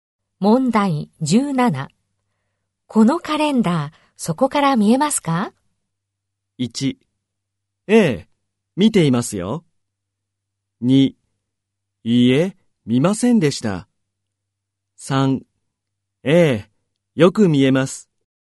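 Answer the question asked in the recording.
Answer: 3: ええ、よく見えます。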